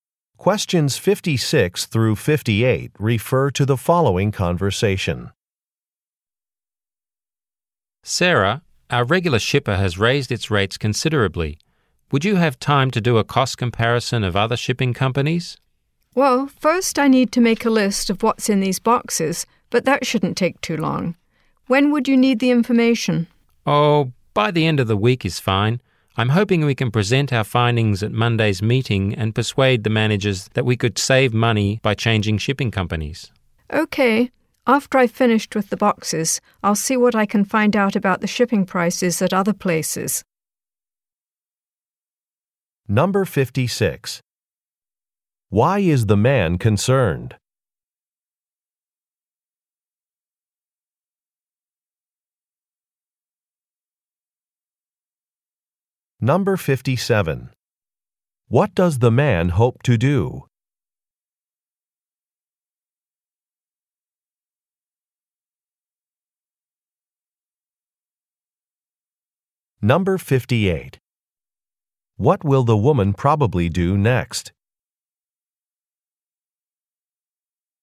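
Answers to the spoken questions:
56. Their regular shipper raised its rates
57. Persuade the managers to change shipping companies to save money
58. List what is in the boxes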